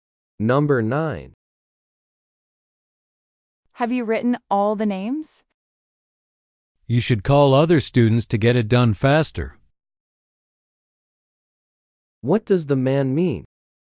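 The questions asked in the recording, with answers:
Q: What does the man mean?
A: The woman should get other students to help.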